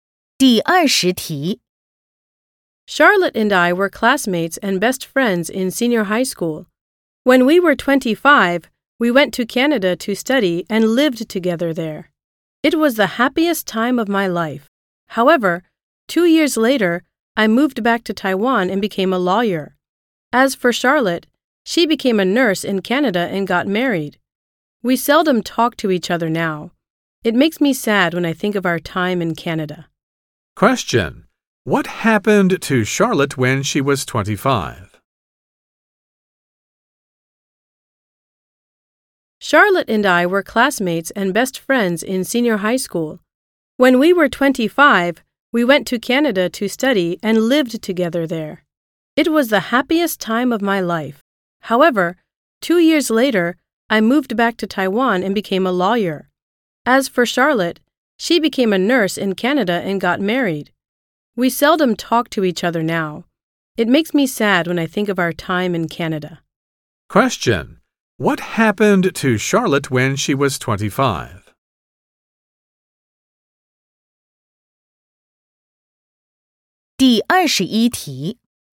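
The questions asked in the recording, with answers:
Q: What happened to Charlotte when she was 25?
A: She went to Canada to study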